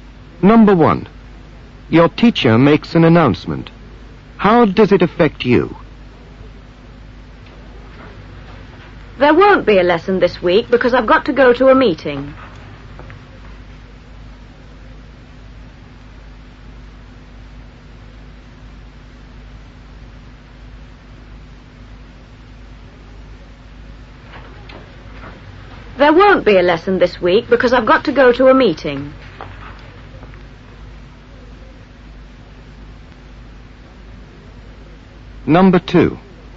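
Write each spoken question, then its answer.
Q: How does it affect you?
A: There won't be a lesson this week (teacher has a meeting)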